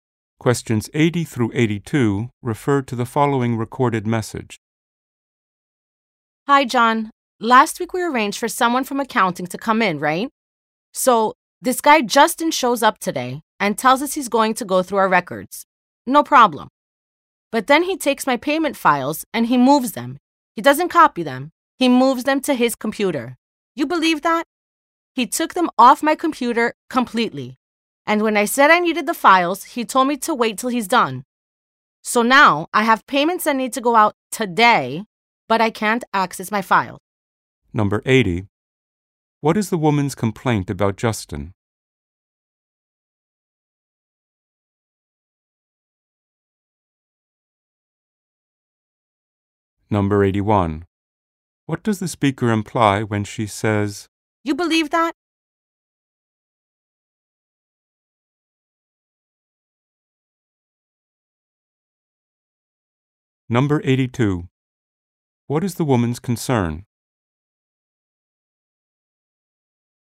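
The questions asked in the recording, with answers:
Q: What is the woman's complaint about Justin?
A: He moved her payment files to his computer

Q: What does the speaker imply when she says,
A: She is surprised and annoyed

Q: What is the woman's concern?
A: She can't make payments due today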